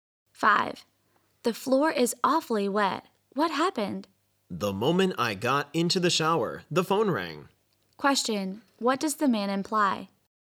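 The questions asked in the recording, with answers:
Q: What does the man imply?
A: He left the shower to answer the phone and made the floor wet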